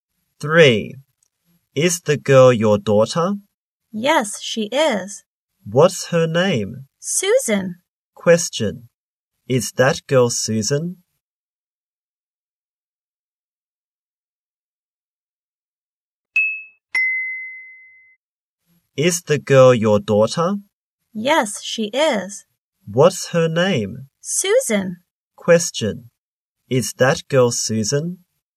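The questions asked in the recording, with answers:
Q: Is that girl Susan?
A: Yes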